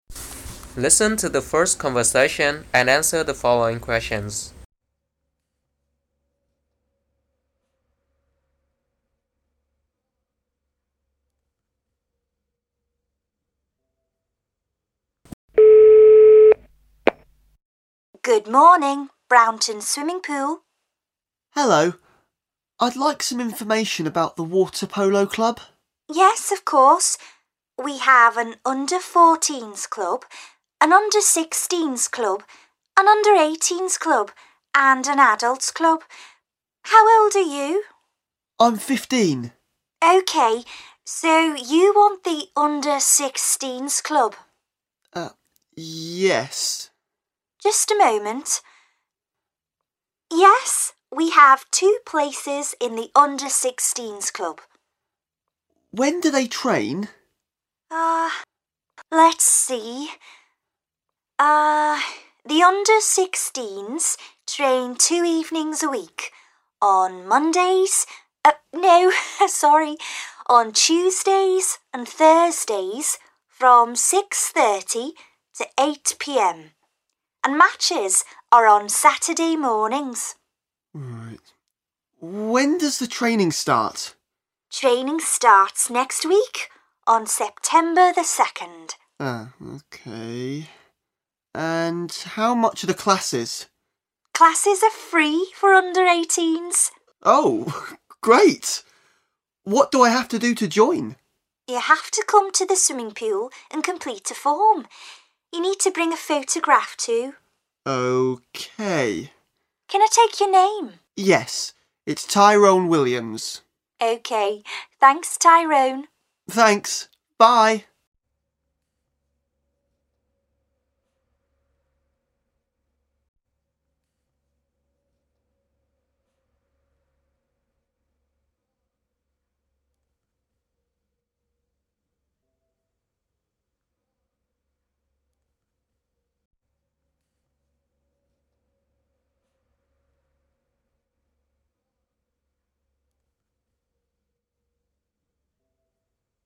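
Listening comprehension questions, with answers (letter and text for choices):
What water polo club does Tyrone want to join?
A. under 14s club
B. under 16s club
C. under 18s club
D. adults club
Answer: B. under 16s club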